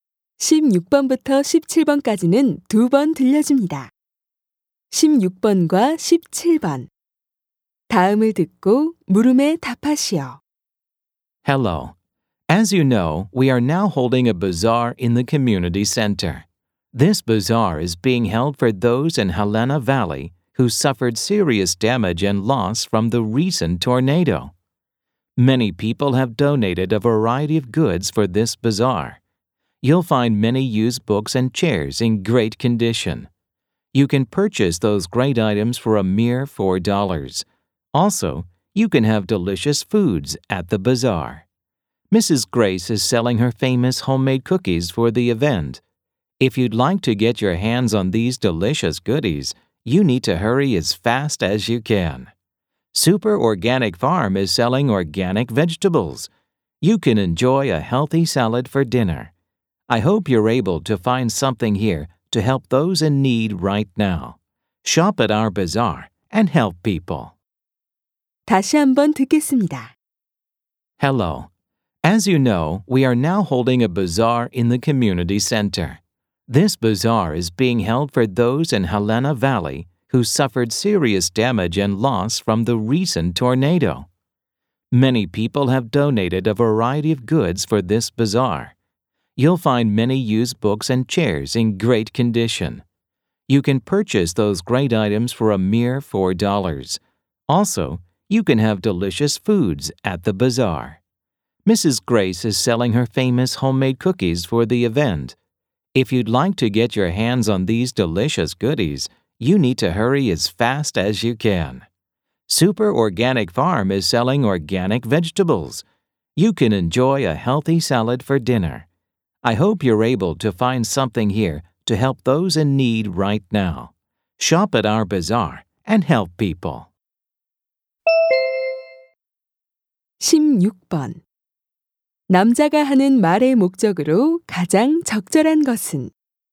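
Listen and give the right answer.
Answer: 토네이도 피해자를 돕기 위한 바자회 참여를 독려하려고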